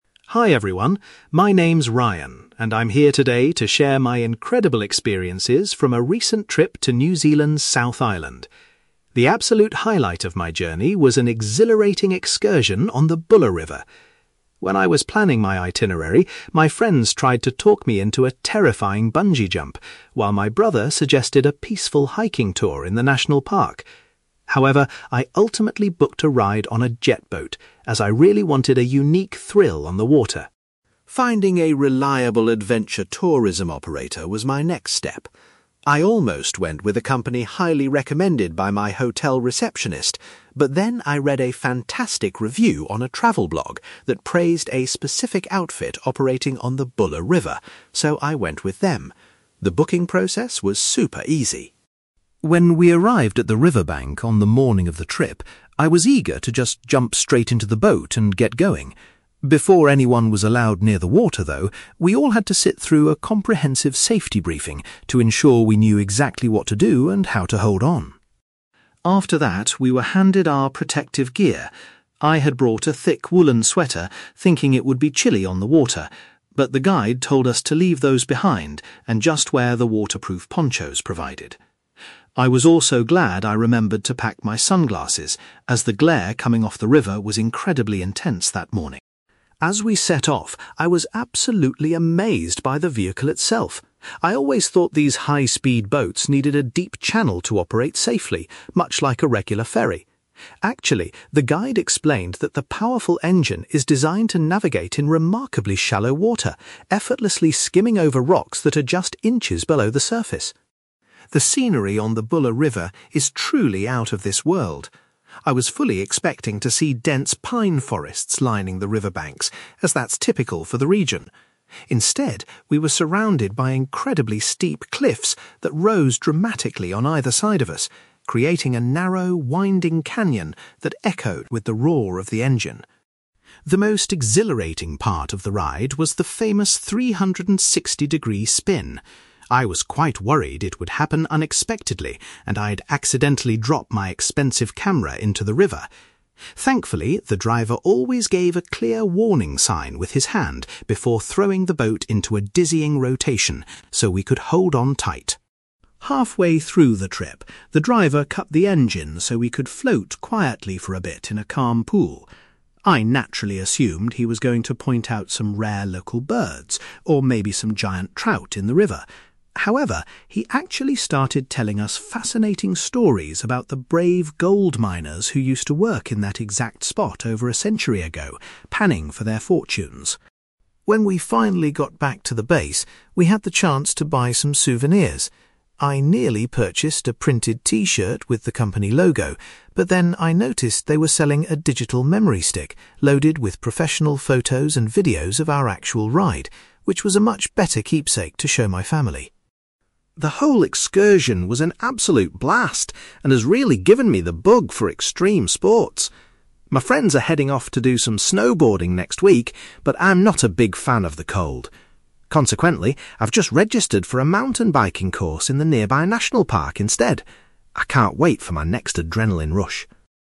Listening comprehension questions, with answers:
You will hear a young man called Ryan talking about an adventure tourism experience he had in New Zealand. For questions 9-18, complete the sentences with a word or short phrase.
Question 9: Ryan decided to go on a (9)........................... instead of doing the activities suggested by his friends and family.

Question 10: Ryan chose the specific tour operator on the Buller River after reading about them on a (10)........................... .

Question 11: Before getting onto the vessel, the passengers were required to attend a (11)........................... .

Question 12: Ryan found his (12)........................... particularly useful because of the bright reflection from the river.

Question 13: Ryan was surprised to learn that the boat was capable of travelling through very (13)........................... .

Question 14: Rather than the woods he anticipated, Ryan noted that the river was bordered by (14)........................... .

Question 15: The boat's driver ensured everyone was ready for the spin by giving a (15)........................... .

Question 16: During a break, the passengers listened to historical tales concerning the (16)........................... of the area.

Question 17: To remember the thrilling experience, Ryan bought a (17)........................... instead of an item of clothing.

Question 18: For his upcoming holiday activity, Ryan is making plans to try (18)........................... .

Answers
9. jet boat
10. travel blog
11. safety briefing
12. sunglasses
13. shallow water
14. steep cliffs
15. warning sign
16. gold miners
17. memory stick
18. mountain biking

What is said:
Ryan: Hi everyone, my name is Ryan, and I'm here today to share my incredible experiences from a recent trip to New Zealand's South Island. The absolute highlight of my journey was an exhilarating excursion on the Buller River. When I was planning my itinerary, my friends tried to talk me into a terrifying bungee jump, while my brother suggested a peaceful hiking tour in the national park. However, I ultimately booked a ride on a jet boat, as I really wanted a unique thrill on the water.
Finding a reliable adventure tourism operator was my next step. I almost went with a company highly recommended by my hotel receptionist, but then I read a fantastic review on a travel blog that praised a specific outfit operating on the Buller River, so I went with them. The booking process was super easy.
When we arrived at the riverbank on the morning of the trip, I was eager to just jump straight into the boat and get going. Before anyone was allowed near the water, though, we all had to sit through a comprehensive safety briefing to ensure we knew exactly what to do and how to hold on.
After that, we were handed our protective gear. I had brought a thick woollen sweater, thinking it would be chilly on the water. But the guide told us to leave those behind and just wear the waterproof ponchos provided. I was also glad I remembered to pack my sunglasses, as the glare coming off the river was incredibly intense that morning.
As we set off, I was absolutely amazed by the vehicle itself. I always thought these high-speed boats needed a deep channel to operate safely, much like a regular ferry. Actually, the guide explained that the powerful engine is designed to navigate in remarkably shallow water, effortlessly skimming over rocks that are just inches below the surface.
The scenery on the Buller River is truly out of this world. I was fully expecting to see dense pine forests lining the riverbanks, as that's typical for the region. Instead, we were surrounded by incredibly steep cliffs that rose dramatically on either side of us, creating a narrow, winding canyon that echoed with the roar of the engine.
The most exhilarating part of the ride was the famous 360-degree spin. I was quite worried it would happen unexpectedly and I'd accidentally drop my expensive camera into the river. Thankfully, the driver always gave a clear warning sign with his hand before throwing the boat into a dizzying rotation, so we could hold on tight.
Halfway through the trip, the driver cut the engine so we could float quietly for a bit in a calm pool. I naturally assumed he was going to point out some rare local birds or maybe some giant trout in the river. However, he actually started telling us fascinating stories about the brave gold miners who used to work in that exact spot over a century ago, panning for their fortunes.
When we finally got back to the base, we had the chance to buy some souvenirs. I nearly purchased a printed t-shirt with the company logo, but then I noticed they were selling a digital memory stick loaded with professional photos and videos of our actual ride, which was a much better keepsake to show my family.
The whole excursion was an absolute blast and has really given me the bug for extreme sports. My friends are heading off to do some snowboarding next week, but I'm not a big fan of the cold. Consequently, I've just registered for a mountain biking course in the nearby national park instead. I can't wait for my next adrenaline rush!

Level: B2